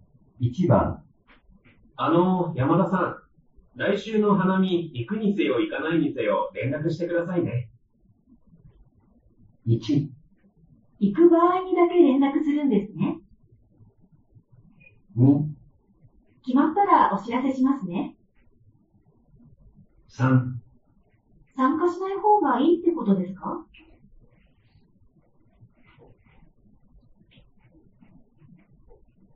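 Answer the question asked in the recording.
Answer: 2: 決まったらお知らせしますね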